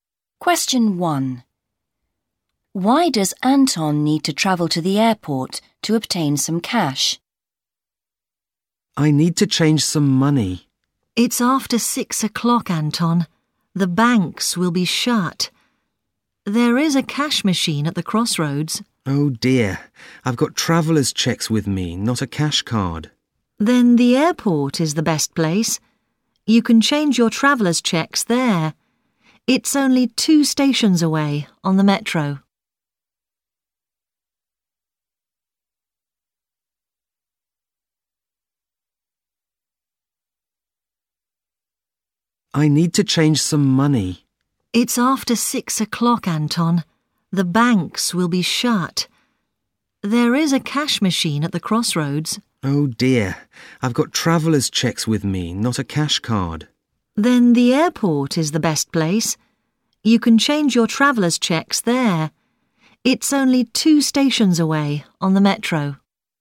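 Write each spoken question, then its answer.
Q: Why does Anton need to travel to the airport to obtain some cash?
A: He has traveller's cheques, not a cash card, and the banks are shut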